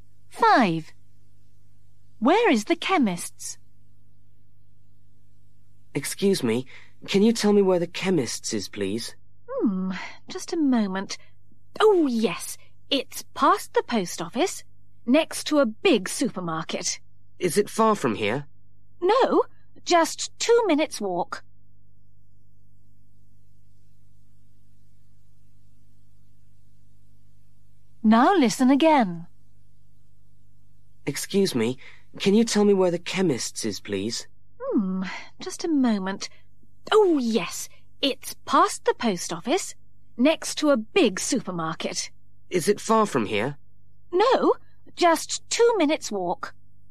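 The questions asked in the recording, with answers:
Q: Where is the chemist's?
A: past the post office, next to a big supermarket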